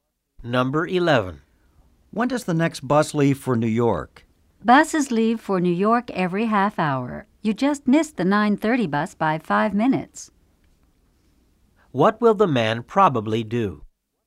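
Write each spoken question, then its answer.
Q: What will the man probably do?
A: Take the 10:00 bus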